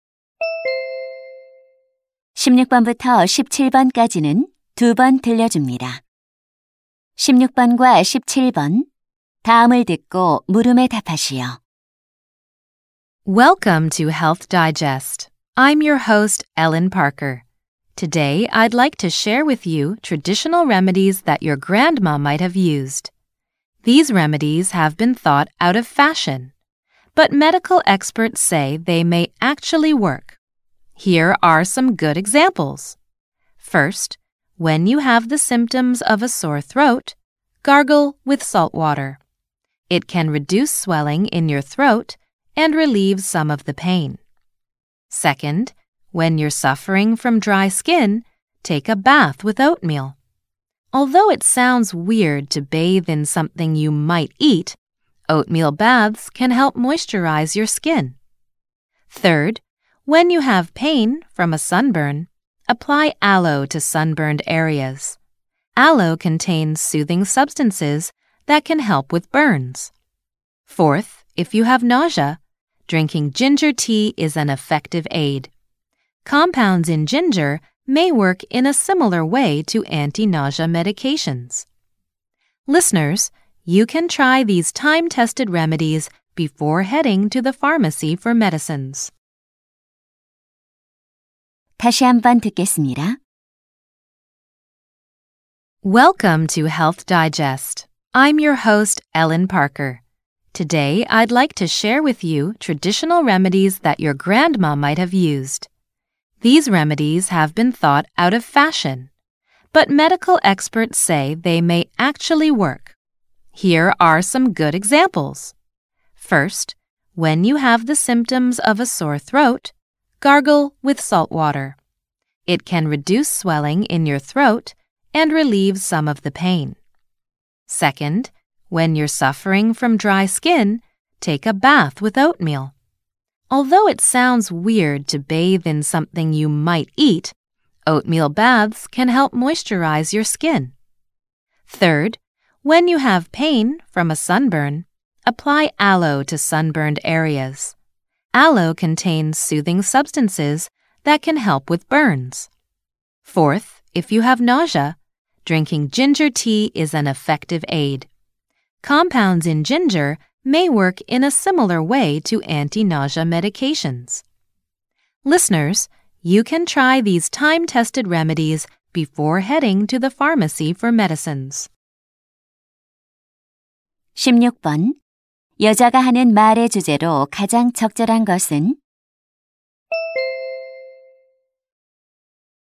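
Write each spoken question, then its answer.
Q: 여자가 하는 말의 주제로 가장 적절한 것은?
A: 효과가 있는 전통 민간요법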